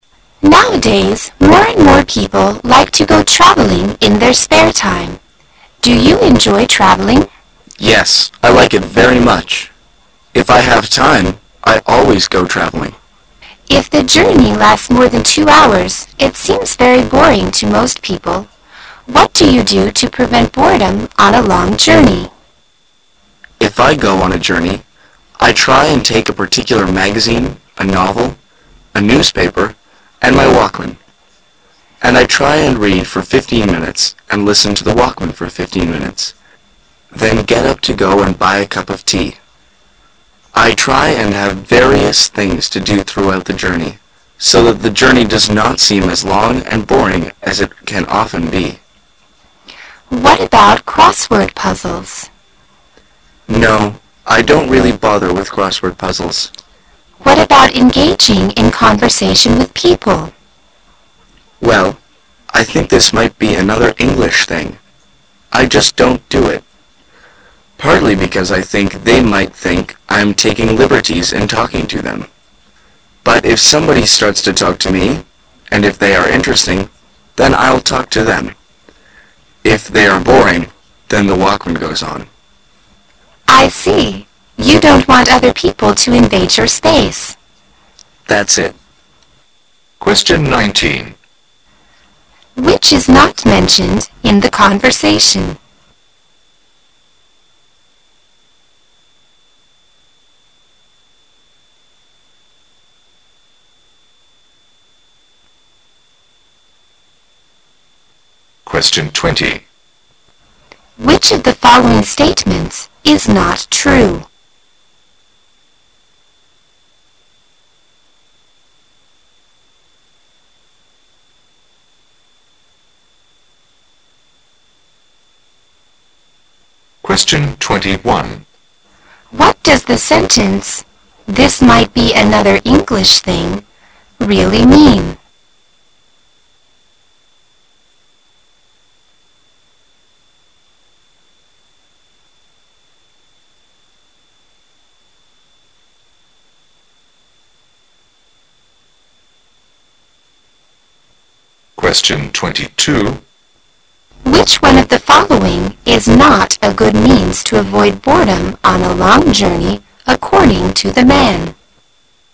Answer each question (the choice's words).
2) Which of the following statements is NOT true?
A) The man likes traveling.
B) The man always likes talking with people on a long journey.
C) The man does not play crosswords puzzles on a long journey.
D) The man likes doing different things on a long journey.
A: The man always likes talking with people on a long journey.

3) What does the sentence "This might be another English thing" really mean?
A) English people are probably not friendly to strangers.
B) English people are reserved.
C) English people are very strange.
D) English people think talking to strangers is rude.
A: English people think talking to strangers is rude.

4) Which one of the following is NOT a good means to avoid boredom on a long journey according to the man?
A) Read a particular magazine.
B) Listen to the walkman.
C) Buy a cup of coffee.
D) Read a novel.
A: Buy a cup of coffee.

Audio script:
[解析] 19-22 W: Nowadays, more and more people like to go traveling in their spare time. Do you enjoy traveling? M: Yes, I like it very much. If I have time, I always go traveling. W: If the journey lasts more than 2 hours, it seems very boring to most people. What do you do to prevent boredom on a long journey? M: If I go on a journey, I try and take a particular magazine, a novel, a newspaper and my walkman. And I try and read for fifteen minutes and listen to the walkman for fifteen minutes, then get up to go and buy a cup of tea. I try and have various things to do throughout the journey so that the journey does not seem as long and boring as it can often be. W: What about crossword puzzles? M: No,I don't really bother with crossword puzzles. W: What about engaging in conversations with people? M: Well, I think this might be another English thing. I just don't do it. Partly because ! think they might think I'm taking liberties in talking to them. But if somebody starts to talk to me and if they are interesting, then I'll talk to them. If they are boring, then the walkman goes on. W: I see. You don't want other people to invade your space. M: That's it. Which is NOT mentioned in the conversation?